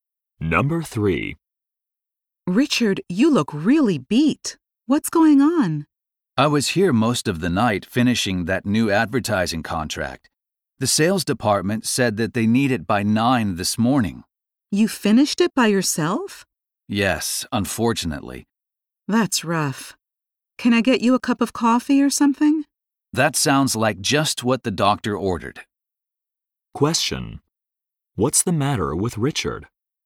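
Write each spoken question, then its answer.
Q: What's the matter with Richard?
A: He is exhausted from working most of the night on a contract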